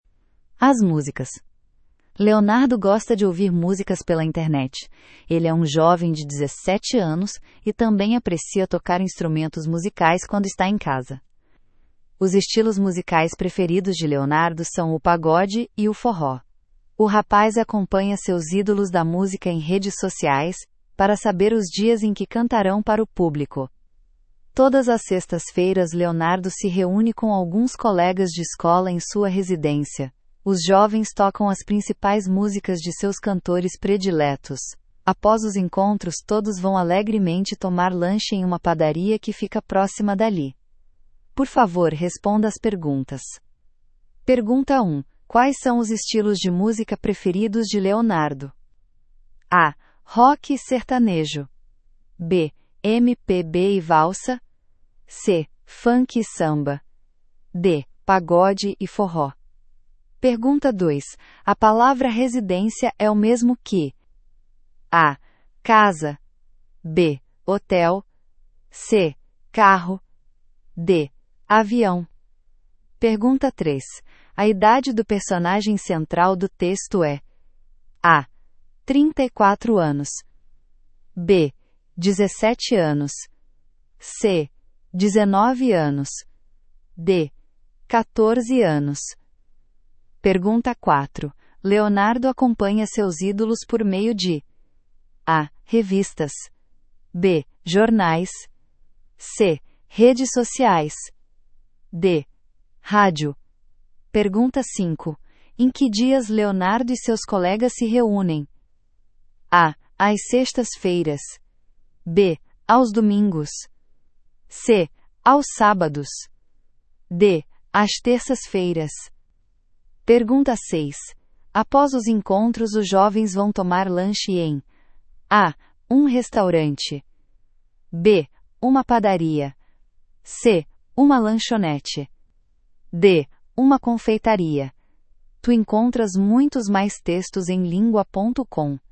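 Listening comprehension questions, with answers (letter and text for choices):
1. Quais são os estilos de música preferidos de Leonardo?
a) Rock e Sertanejo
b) MPB e Valsa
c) Funk e Samba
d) Pagode e Forró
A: d) Pagode e Forró

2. A palavra "residência" é o mesmo que:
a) Casa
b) Hotel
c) Carro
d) Avião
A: a) Casa

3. A idade do personagem central do texto é:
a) 34 anos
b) 17 anos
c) 19 anos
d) 14 anos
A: b) 17 anos

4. Leonardo acompanha seus ídolos por meio de:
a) Revistas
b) Jornais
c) Redes Sociais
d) Rádio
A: c) Redes Sociais

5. Em que dias Leonardo e seus colegas se reúnem?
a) Às sextas-feiras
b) Aos domingos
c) Aos sábados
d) Às terças-feiras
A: a) Às sextas-feiras

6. Após os encontros, os jovens vão tomar lanche em:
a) Um restaurante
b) Uma padaria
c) Uma lanchonete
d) Uma confeitaria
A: b) Uma padaria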